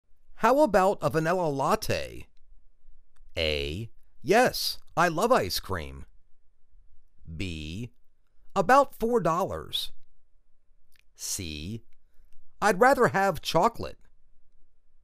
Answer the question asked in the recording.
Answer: I'd rather have chocolate.